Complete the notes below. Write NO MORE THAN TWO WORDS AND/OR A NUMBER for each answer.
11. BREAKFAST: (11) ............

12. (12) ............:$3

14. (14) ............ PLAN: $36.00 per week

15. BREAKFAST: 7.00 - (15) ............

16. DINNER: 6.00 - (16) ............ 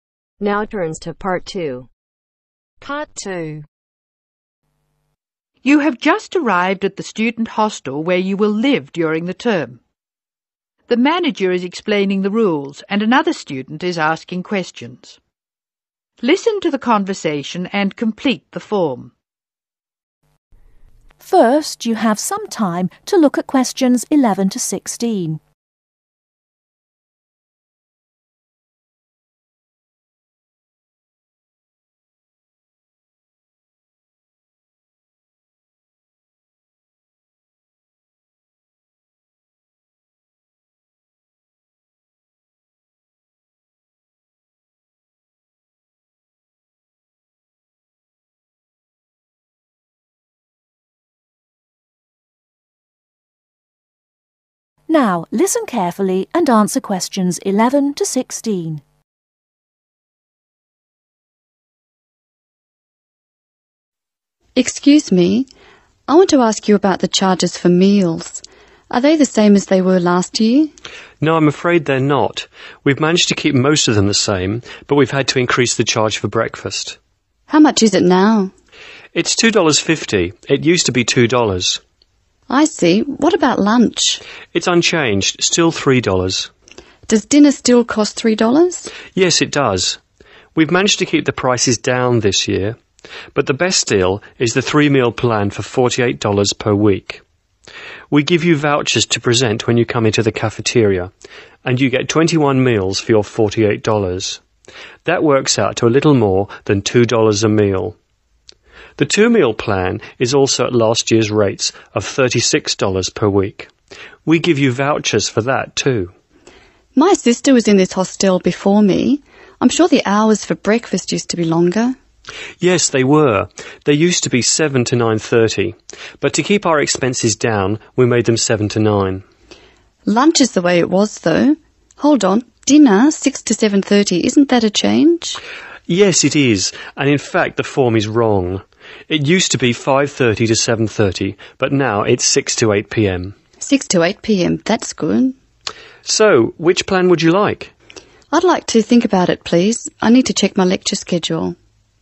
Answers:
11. $2.50
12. Luch
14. Two Meal
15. 9.00 am / 9 am
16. 8.00 pm / 8 pm